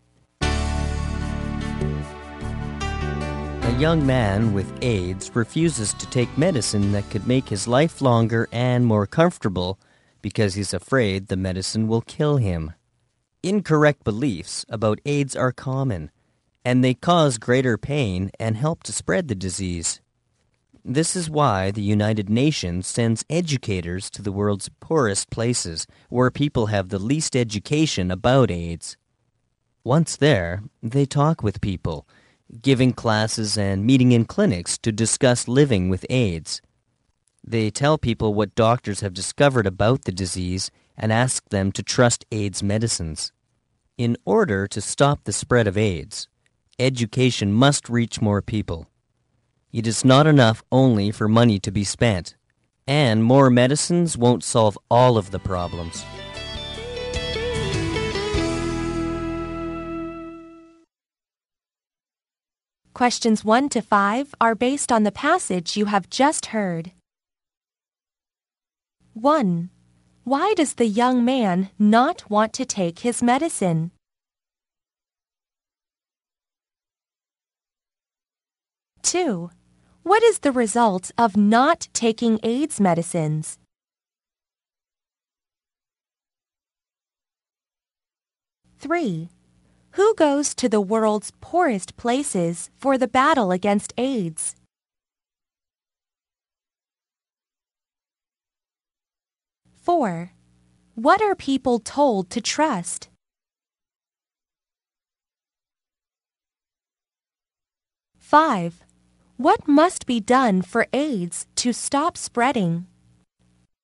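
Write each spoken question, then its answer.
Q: Why does the young man not want to take his medicine?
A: He is afraid the medicine will kill him

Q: Who goes to the world's poorest places for the battle against AIDS?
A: Educators sent by the United Nations

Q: What are people told to trust?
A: AIDS medicines

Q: What must be done for AIDS to stop spreading?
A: Education must reach more people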